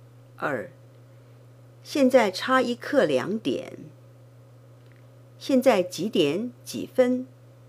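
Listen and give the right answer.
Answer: 1点45分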